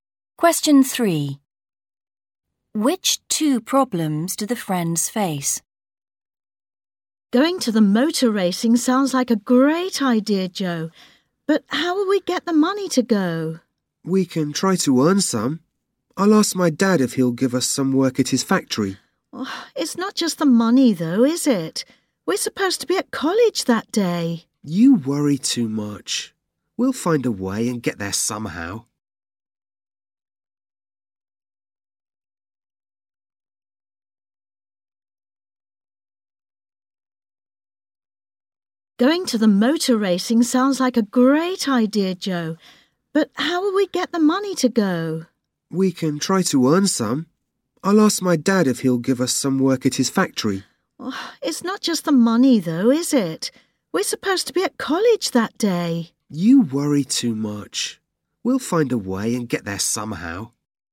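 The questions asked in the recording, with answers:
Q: Which two problems do the friends face?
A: Getting the money, and they are supposed to be at college that day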